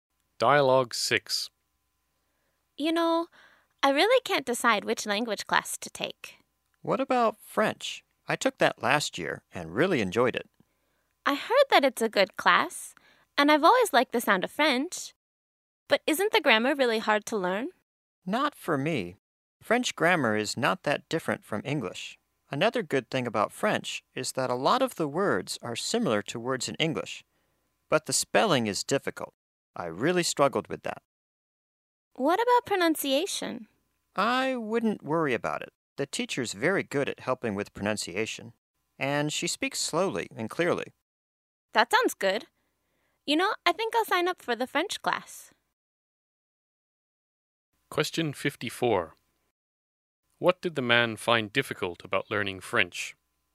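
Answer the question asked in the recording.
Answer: The spelling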